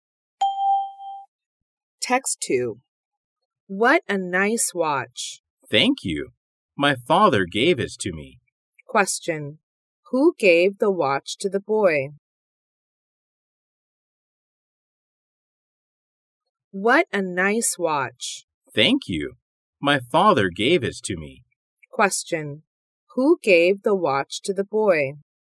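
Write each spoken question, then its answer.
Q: Who gave the watch to the boy?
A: His father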